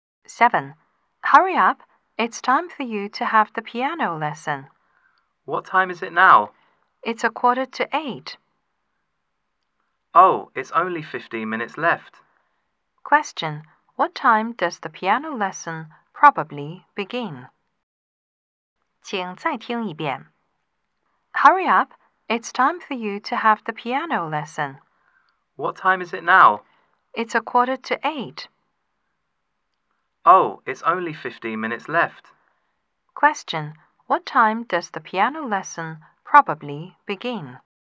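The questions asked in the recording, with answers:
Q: What time does the piano lesson probably begin?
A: At 8:00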